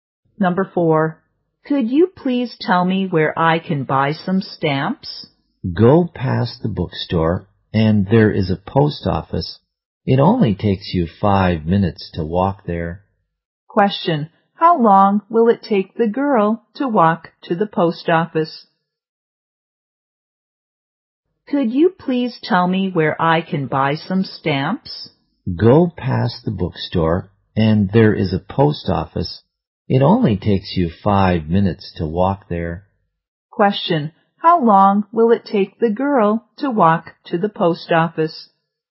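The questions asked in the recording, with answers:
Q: how long will it take the girl to walk to the post office?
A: 5 minutes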